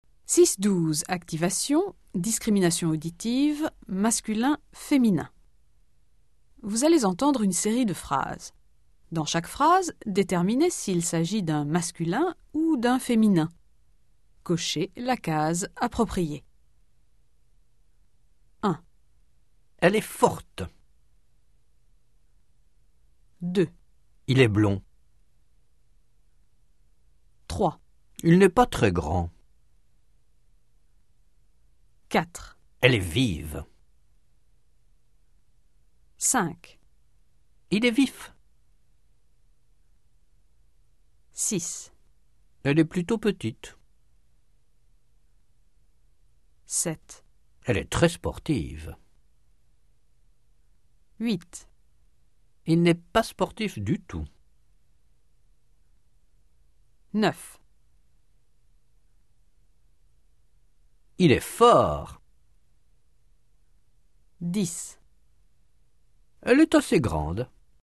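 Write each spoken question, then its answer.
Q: Elle est forte.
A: féminin

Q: Il est blond.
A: masculin

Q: Il n'est pas très grand.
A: masculin

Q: Elle est vive.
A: féminin

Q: Il est vif.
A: masculin

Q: Elle est plutôt petite.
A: féminin

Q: Elle est très sportive.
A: féminin

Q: Il n'est pas sportif du tout.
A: masculin

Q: Il est fort.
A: masculin

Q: Elle est assez grande.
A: féminin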